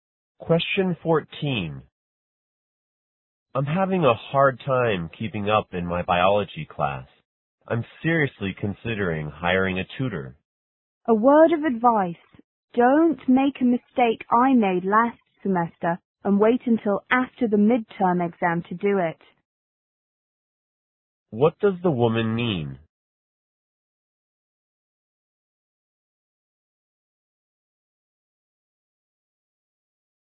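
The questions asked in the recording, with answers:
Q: What does the woman mean?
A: The man should hire a tutor now, before the midterm.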